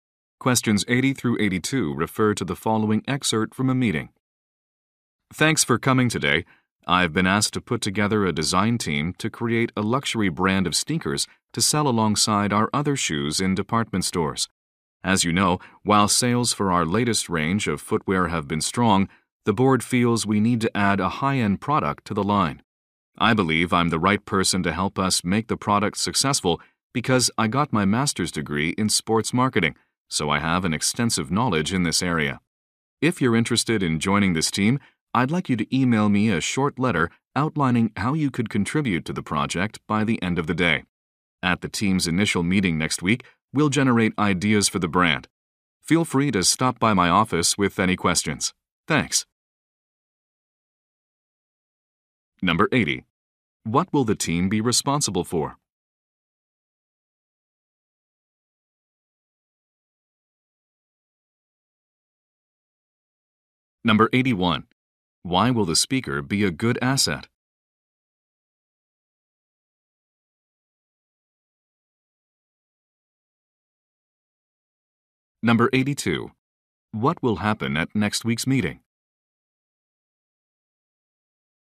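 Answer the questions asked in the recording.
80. Designing a luxury brand of sneakers
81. He has a master's degree in sports marketing
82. They will generate ideas for the brand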